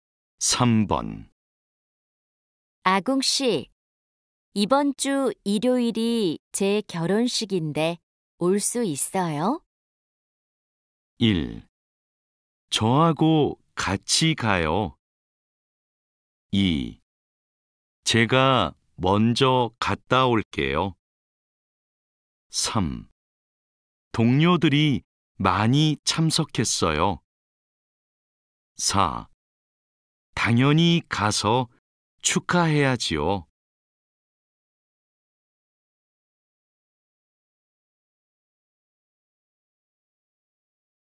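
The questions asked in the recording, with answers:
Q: 아궁 씨, 이번 주 일요일이 제 결혼식인데 올 수 있어요?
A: 4: 당연히 가서 축하해야지요.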